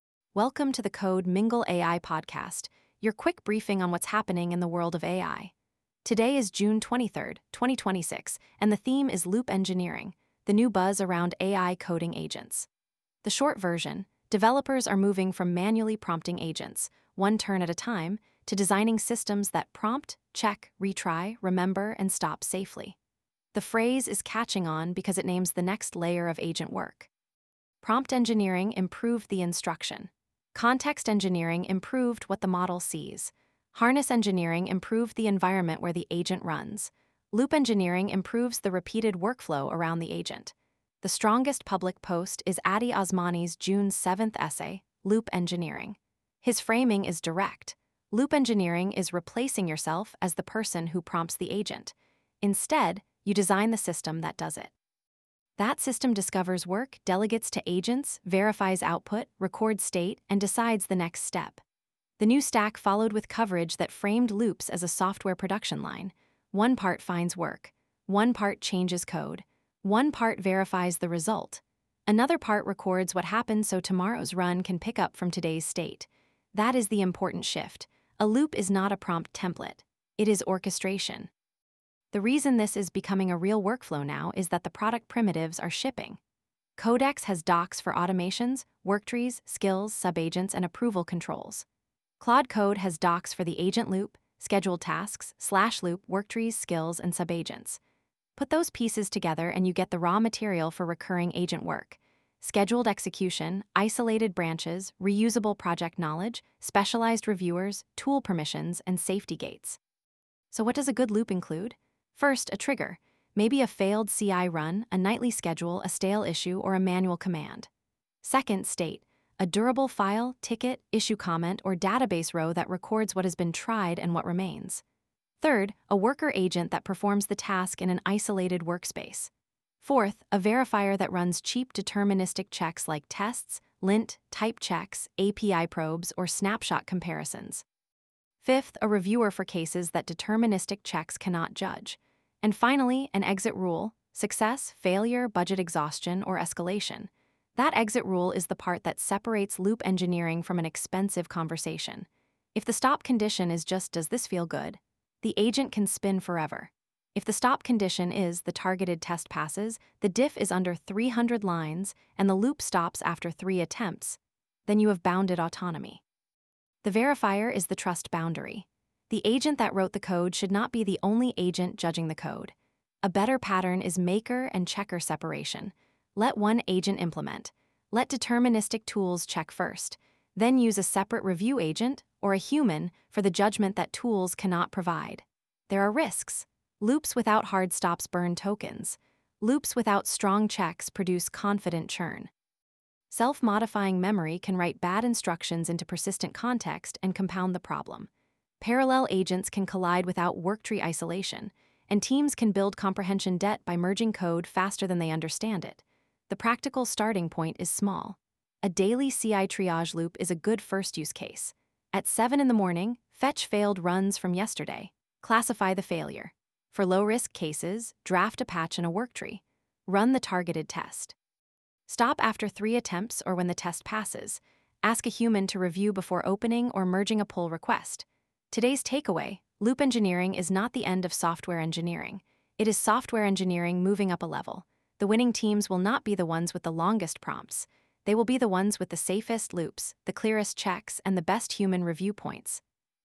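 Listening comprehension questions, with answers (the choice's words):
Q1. What is the core idea behind loop engineering?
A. Designing a repeated agent workflow with checks, retries, state, and an exit condition.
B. Writing a longer one-shot prompt for every task.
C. Removing all tests so agents can move faster.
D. Using only image models for software engineering.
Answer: Designing a repeated agent workflow with checks, retries, state, and an exit condition.

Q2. Why are deterministic checks important in a loop?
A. They provide cheap, objective evidence that the loop should continue or stop.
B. They make token budgets unnecessary.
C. They allow the agent to skip code review forever.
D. They prevent any need for source control.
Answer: They provide cheap, objective evidence that the loop should continue or stop.

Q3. What is the role of worktrees in loop engineering?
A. They isolate parallel agent work so file edits do not collide.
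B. They replace all project documentation.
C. They make failed tests pass automatically.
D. They disable persistent state.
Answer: They isolate parallel agent work so file edits do not collide.

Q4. What is a major risk of self-modifying agent memory?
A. Bad guidance can become persistent context and bias future runs.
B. The agent will forget every file immediately.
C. It makes all loops free to run.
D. It removes the need for human review.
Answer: Bad guidance can become persistent context and bias future runs.

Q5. What is the safest first loop for most teams?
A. A small workflow with a clear trigger, cheap check, hard stop, and human review.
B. A fully autonomous system that merges any generated code.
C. A loop with no budget or time limit.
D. A conversational loop whose only check is whether the output sounds confident.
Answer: A small workflow with a clear trigger, cheap check, hard stop, and human review.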